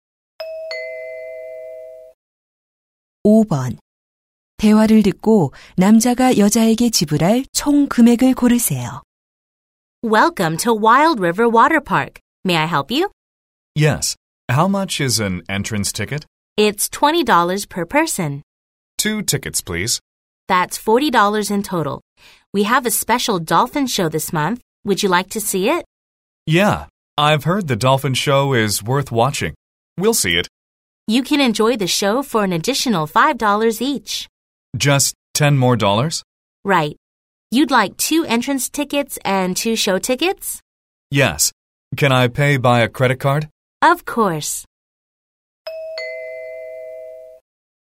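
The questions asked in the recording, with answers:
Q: 대화를 듣고 남자가 여자에게 지불할 총 금액을 고르세요.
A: 50달러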